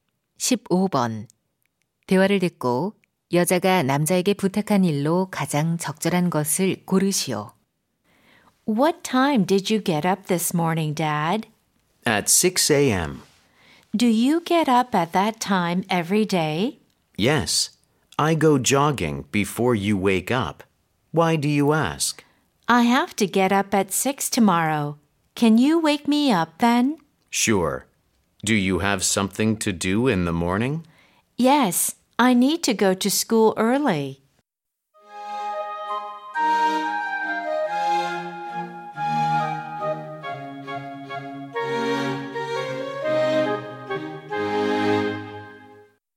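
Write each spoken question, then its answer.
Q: 대화를 듣고 여자가 남자에게 부탁한 일로 가장 적절한 것을 고르시오.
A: 아침 6시에 깨워 주기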